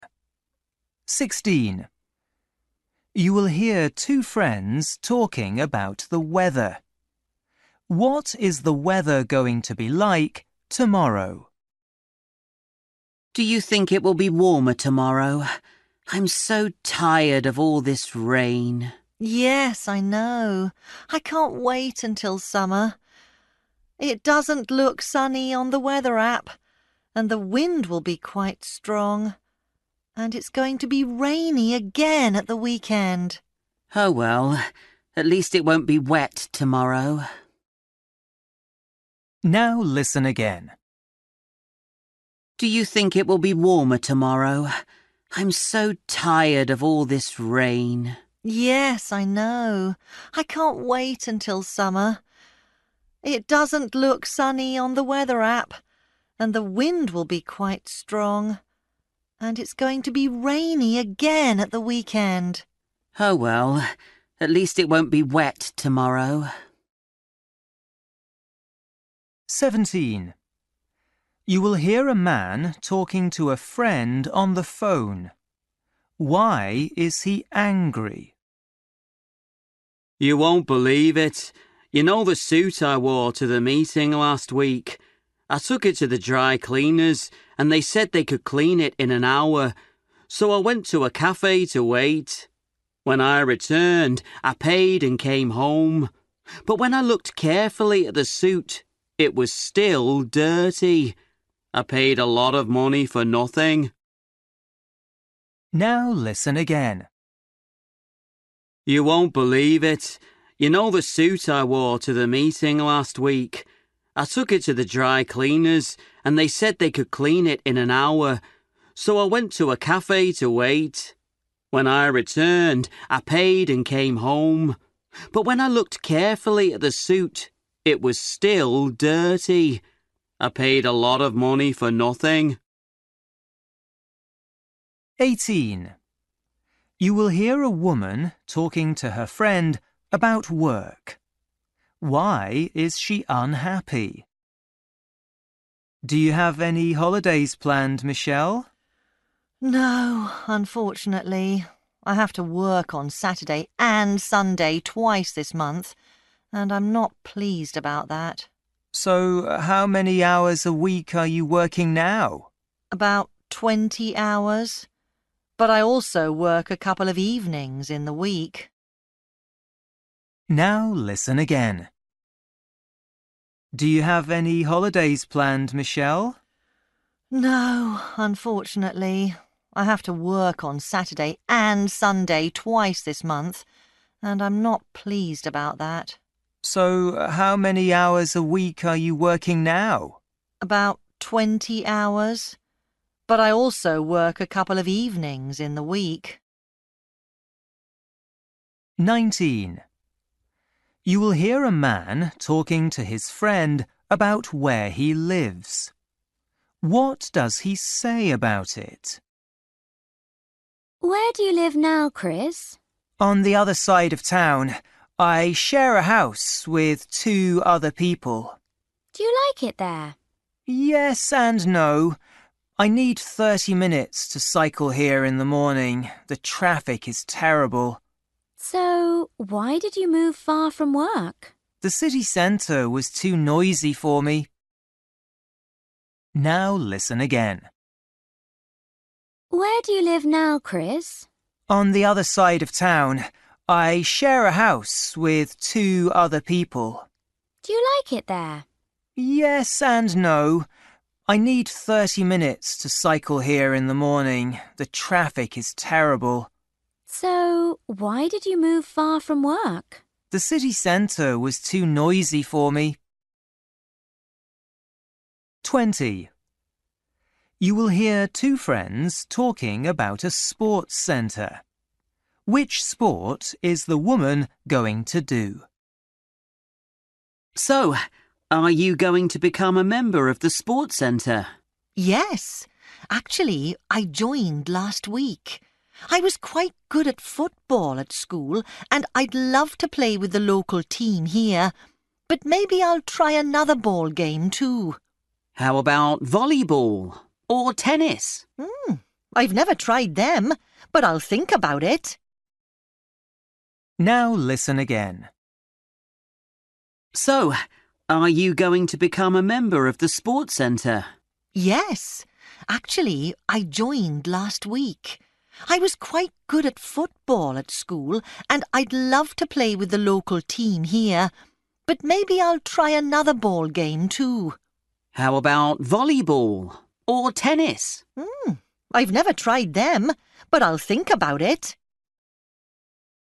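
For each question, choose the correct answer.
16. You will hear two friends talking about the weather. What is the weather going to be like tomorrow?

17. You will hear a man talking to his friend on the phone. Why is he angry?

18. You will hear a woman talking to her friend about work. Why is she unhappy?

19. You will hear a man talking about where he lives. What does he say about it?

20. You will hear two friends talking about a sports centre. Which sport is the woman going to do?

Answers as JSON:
{"16": "Windy (dry, not sunny)", "17": "His suit was still dirty after dry cleaning", "18": "She has to work at weekends", "19": "It is far from work (30 minutes by bike)", "20": "Football"}

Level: Luyện nghe trình độ A2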